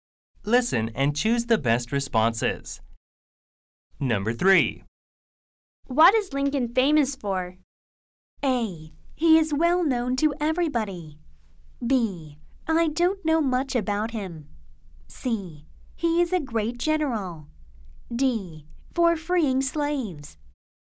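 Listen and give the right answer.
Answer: D: For freeing slaves.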